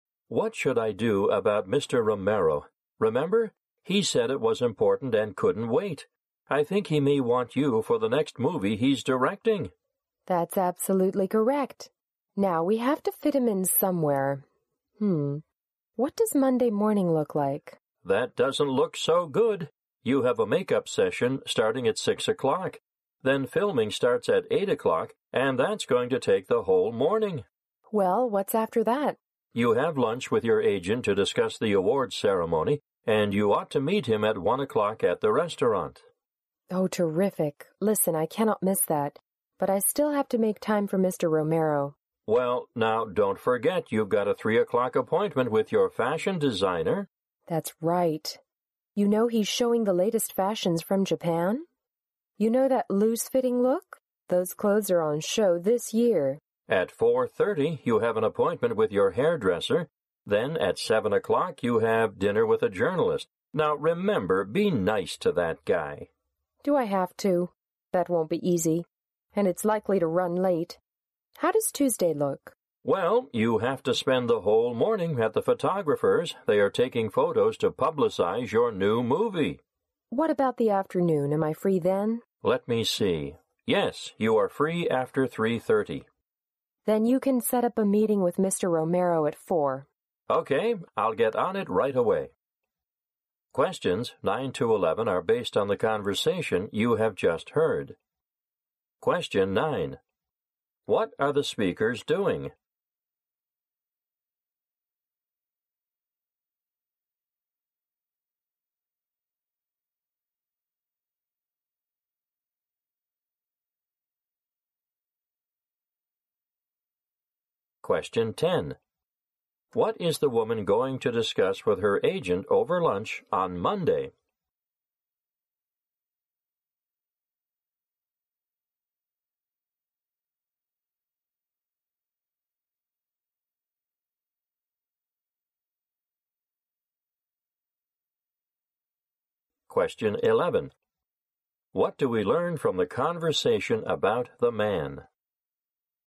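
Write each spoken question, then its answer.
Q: What are the speakers doing?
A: Discussing/arranging the woman's schedule to fit in a meeting with Mr. Romero

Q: What is the woman going to discuss with her agent over lunch on Monday?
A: The awards ceremony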